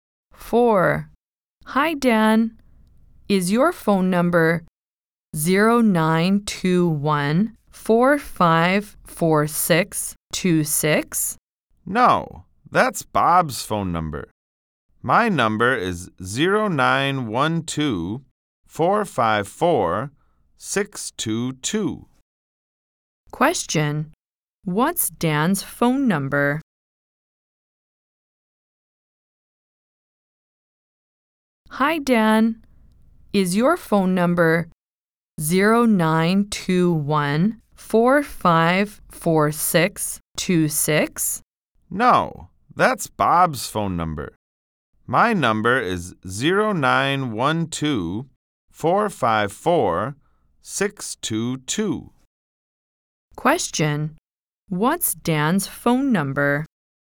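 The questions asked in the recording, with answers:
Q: What's Dan's phone number?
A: 0912-454-622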